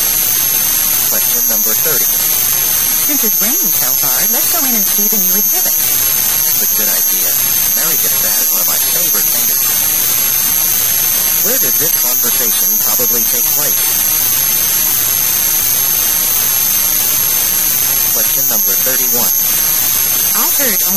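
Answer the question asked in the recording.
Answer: Outside an art museum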